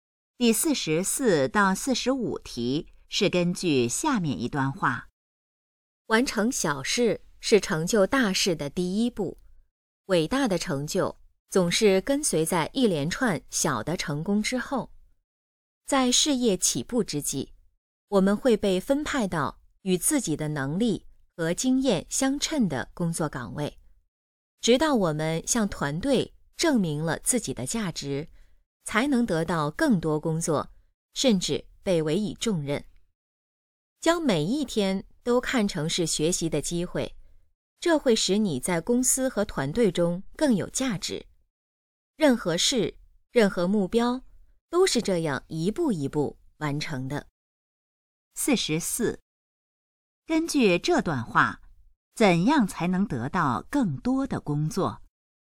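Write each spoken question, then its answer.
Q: 根据这段话,怎样才能得到更多的工作?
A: 向团队证明自己的价值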